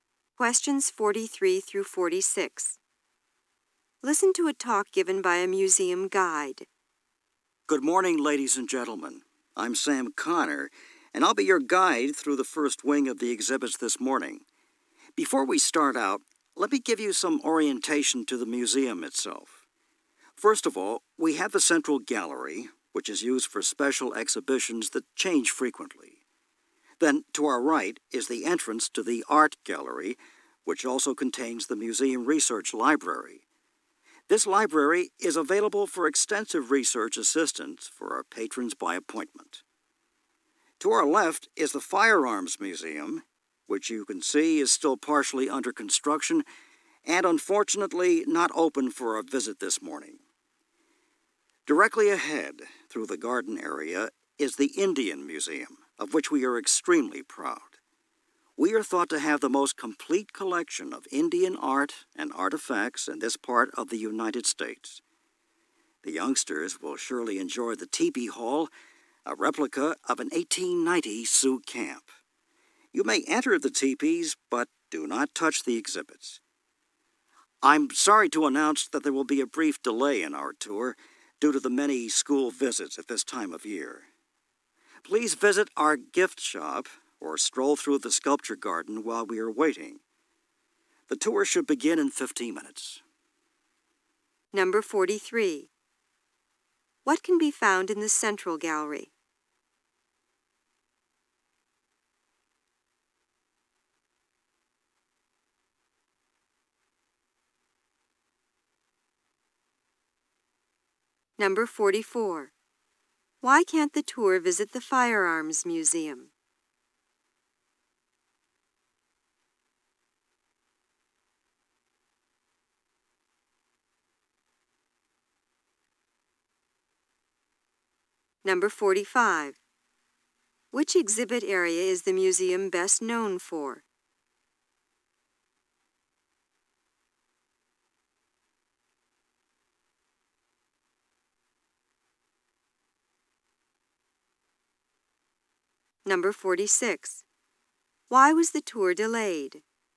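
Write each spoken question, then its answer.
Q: What can be found in the central gallery?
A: Special exhibitions that change frequently

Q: Why can't the tour visit the Firearms Museum?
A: It is still under construction

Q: Which exhibit area is the museum best known for?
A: The Indian Museum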